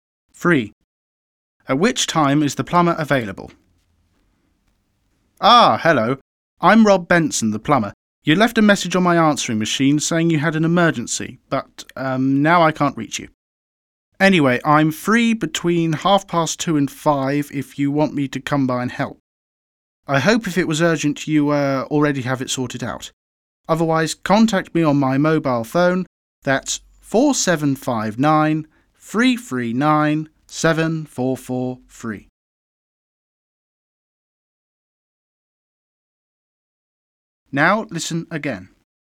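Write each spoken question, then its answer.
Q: At which time is the plumber available?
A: Between 2:30 and 5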